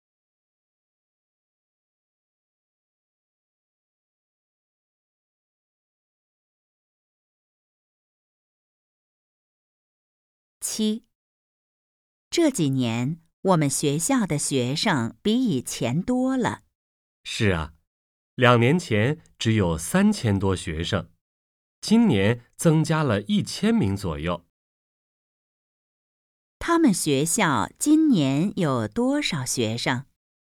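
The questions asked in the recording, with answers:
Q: 他们学校今年有多少学生?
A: 4000多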